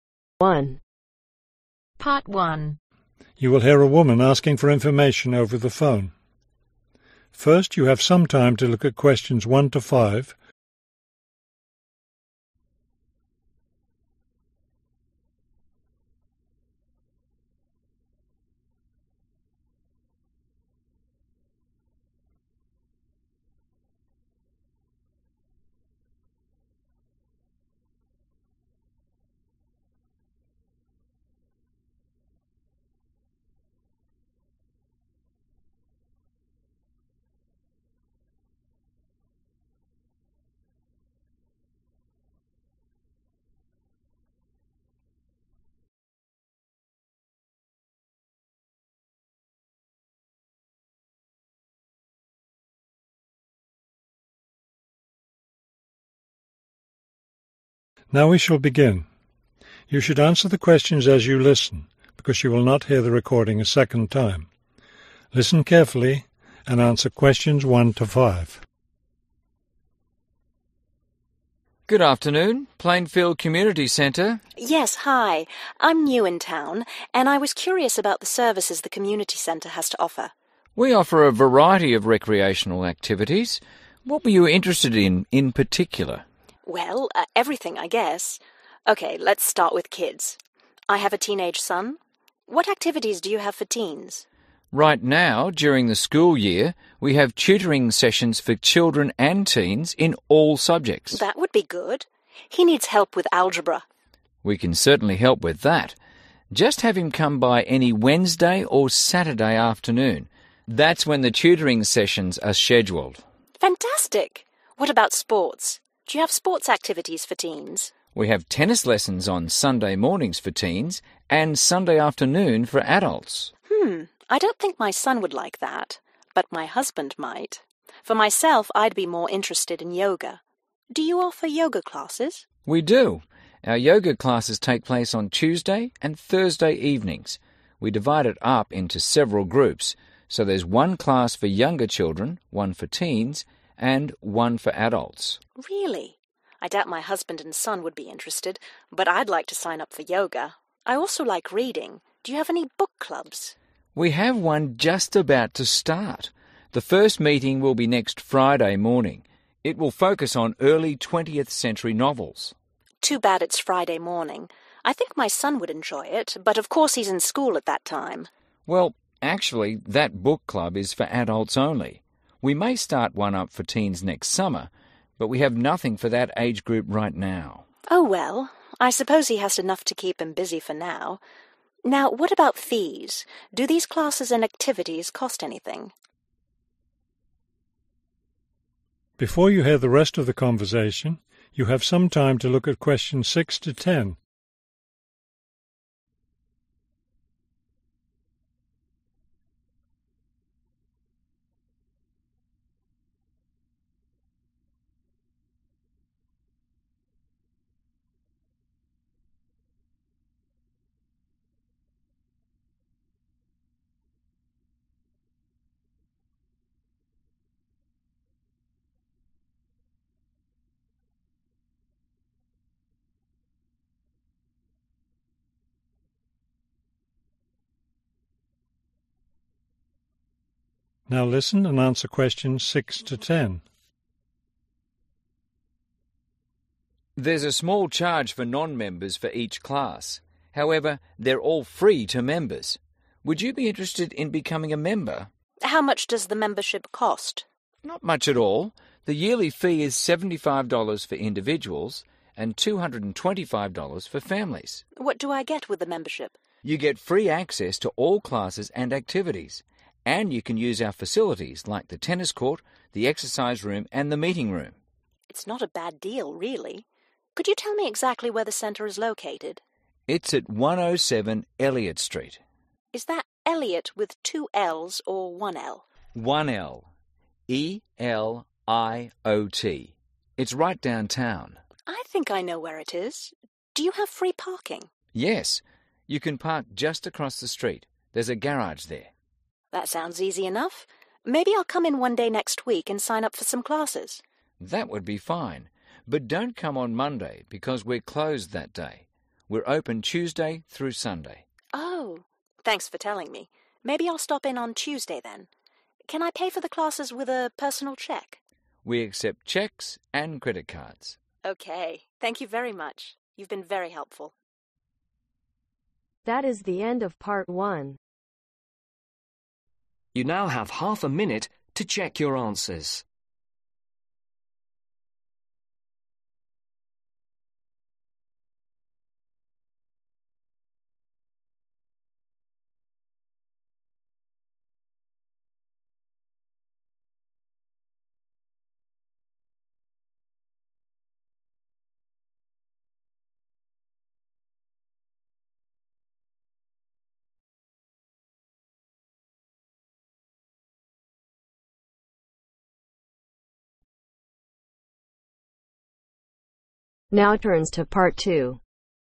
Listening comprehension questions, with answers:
Complete the table below. Write ONE WORD ONLY for each answer.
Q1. (1)............ sessions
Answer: Tutoring

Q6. Membership fees (6) $ ............ (individual)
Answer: 75

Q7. (7) $ ............ (family)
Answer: 225

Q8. Located at 107 (8)............ Street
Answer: Eliot

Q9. Parking is located across the street in a (9)............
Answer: Garage

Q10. The Center is closed on (10)............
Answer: Monday